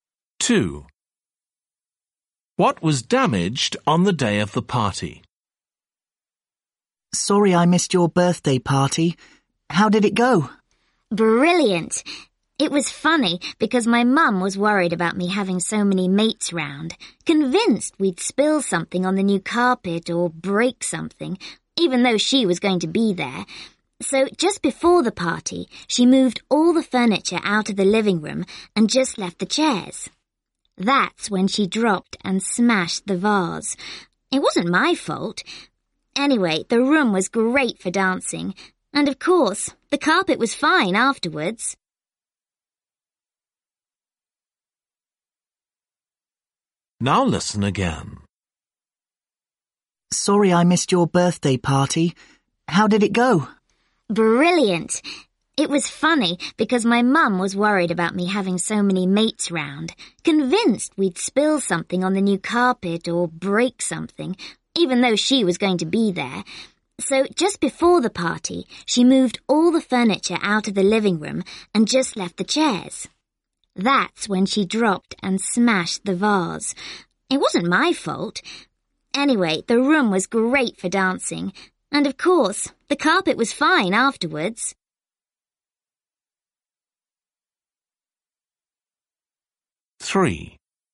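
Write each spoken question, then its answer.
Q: What was damaged on the day of the party?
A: A vase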